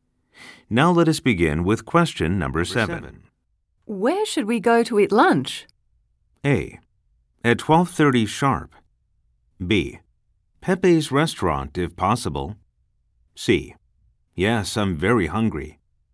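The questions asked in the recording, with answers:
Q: Where should we go to eat lunch?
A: B: Pepe's restaurant, if possible.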